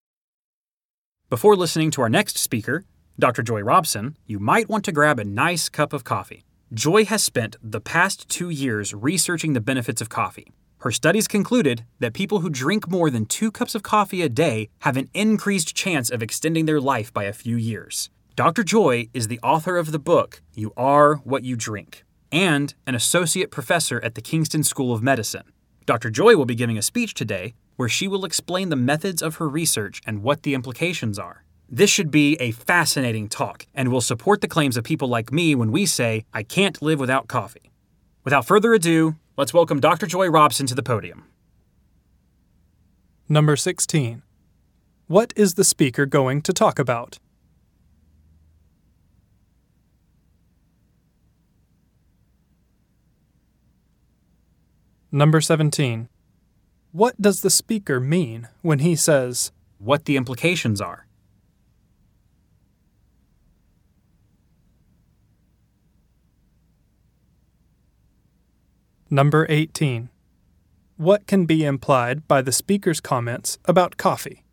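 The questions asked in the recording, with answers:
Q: What can be implied by the speaker's comments about coffee?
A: The speaker loves coffee and drinks a lot of it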